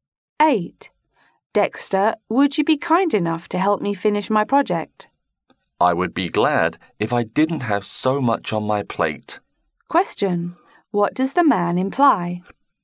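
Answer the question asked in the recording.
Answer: He is too busy to help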